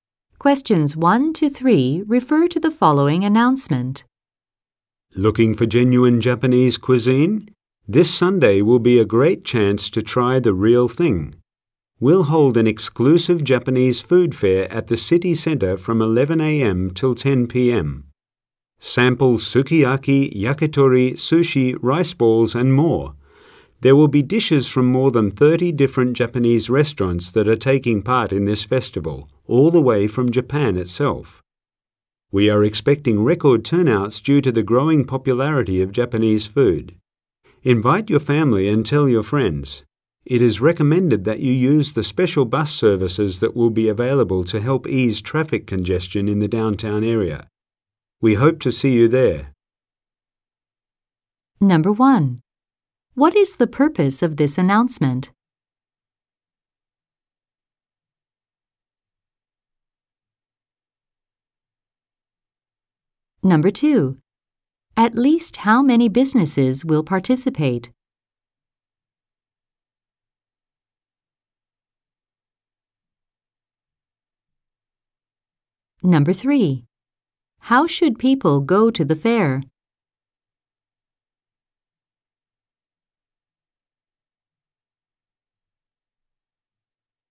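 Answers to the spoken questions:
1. To advertise a Japanese food fair
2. More than 30 restaurants
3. By the special bus services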